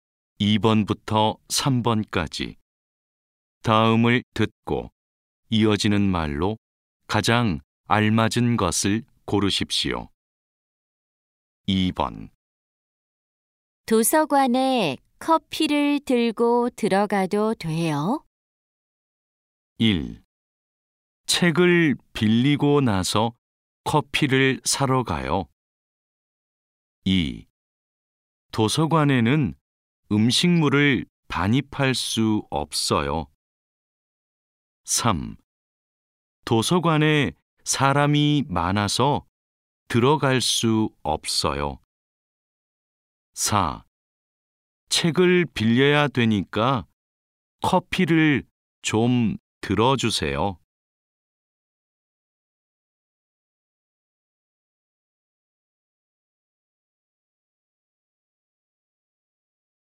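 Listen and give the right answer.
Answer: 2: 도서관에는 음식물을 반입할 수 없어요.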